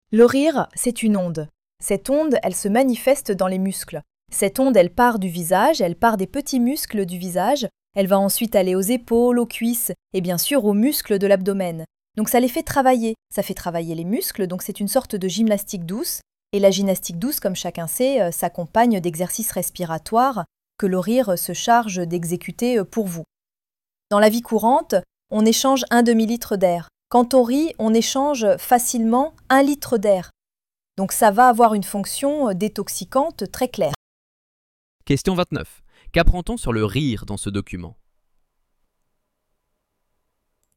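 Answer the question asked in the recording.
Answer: C'est une gymnastique douce qui fait travailler les muscles et la respiration, avec un effet détoxifiant.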